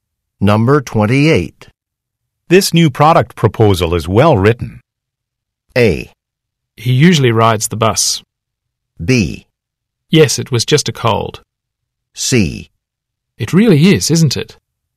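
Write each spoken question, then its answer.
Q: This new product proposal is well written.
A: C: It really is, isn't it?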